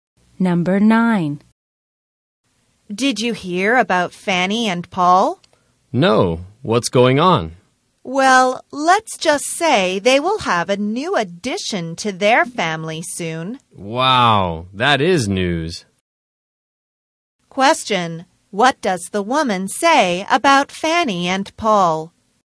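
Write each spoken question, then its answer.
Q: What does the woman say about Fanny and Paul?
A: They will have a baby soon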